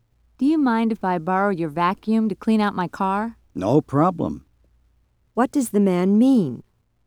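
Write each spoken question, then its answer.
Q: What does the man mean?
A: He will lend the woman his vacuum.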